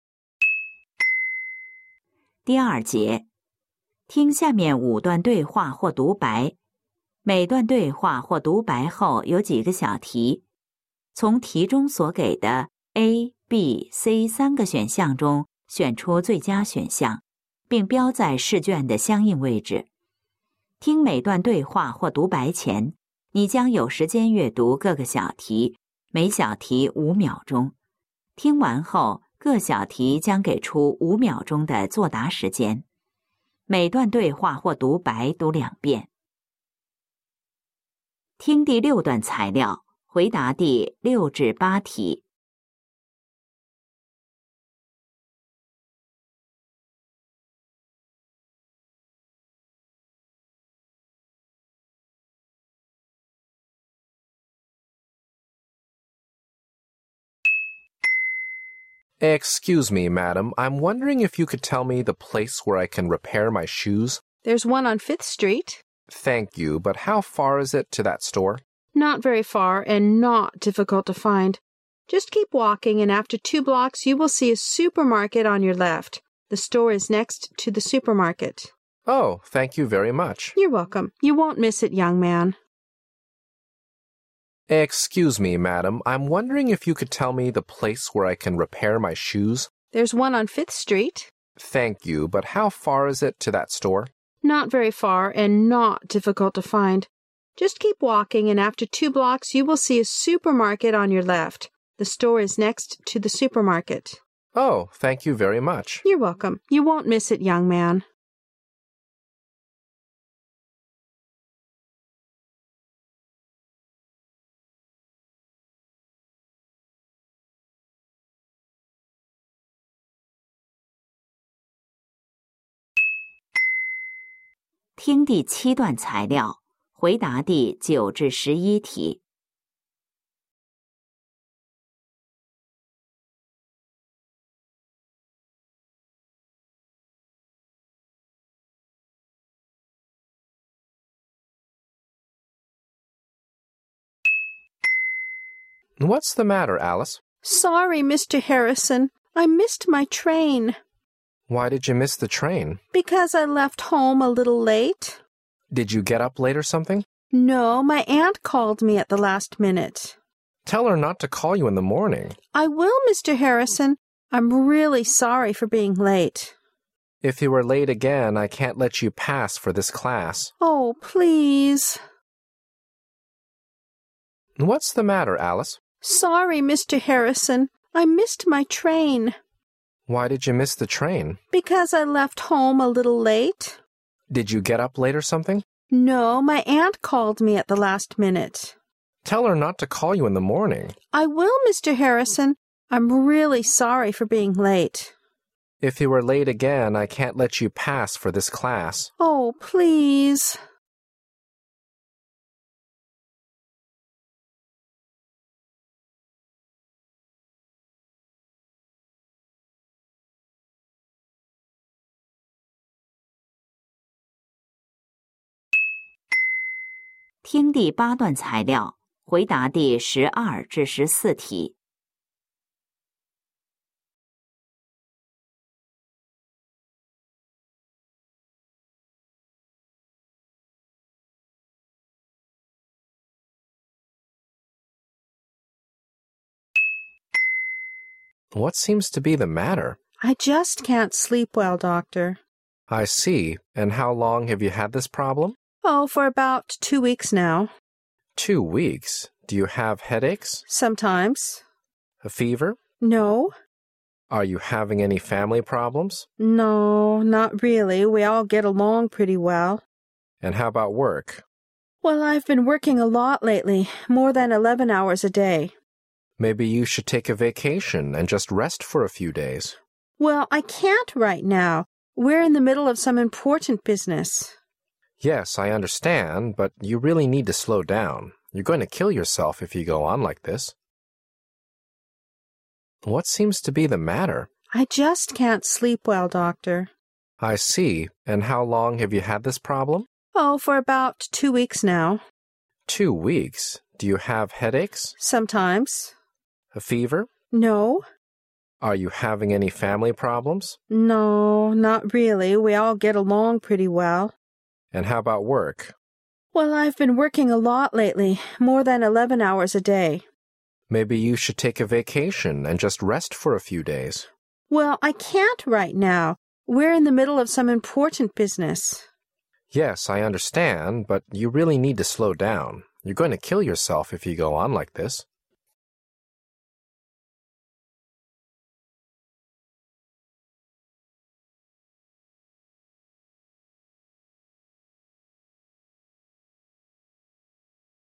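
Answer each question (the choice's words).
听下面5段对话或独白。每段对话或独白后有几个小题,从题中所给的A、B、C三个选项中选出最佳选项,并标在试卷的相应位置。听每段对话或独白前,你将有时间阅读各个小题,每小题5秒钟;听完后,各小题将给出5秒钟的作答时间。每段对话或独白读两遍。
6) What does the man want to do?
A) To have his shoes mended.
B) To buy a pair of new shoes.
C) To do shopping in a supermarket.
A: To have his shoes mended.

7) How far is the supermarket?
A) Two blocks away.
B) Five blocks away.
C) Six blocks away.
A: Two blocks away.

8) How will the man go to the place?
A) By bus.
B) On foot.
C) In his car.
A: On foot.

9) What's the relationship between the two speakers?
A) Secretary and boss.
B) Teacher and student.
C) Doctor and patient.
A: Teacher and student.

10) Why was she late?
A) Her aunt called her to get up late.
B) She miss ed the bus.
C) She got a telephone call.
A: She got a telephone call.

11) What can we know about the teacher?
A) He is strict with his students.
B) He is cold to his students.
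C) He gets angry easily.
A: He is strict with his students.

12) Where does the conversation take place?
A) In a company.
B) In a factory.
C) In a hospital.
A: In a hospital.

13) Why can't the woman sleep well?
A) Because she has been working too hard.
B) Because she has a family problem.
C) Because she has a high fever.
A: Because she has been working too hard.

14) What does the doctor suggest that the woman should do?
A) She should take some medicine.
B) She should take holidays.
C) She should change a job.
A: She should take holidays.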